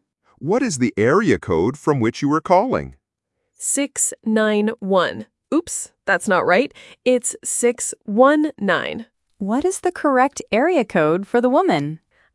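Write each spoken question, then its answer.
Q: What is the correct area code for the woman?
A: 619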